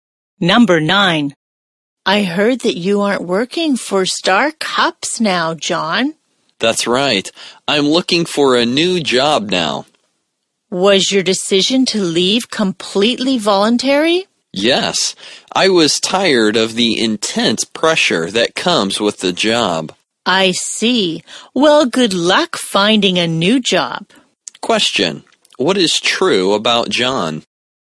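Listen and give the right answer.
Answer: He left his job at Star Cups voluntarily and is looking for a new job.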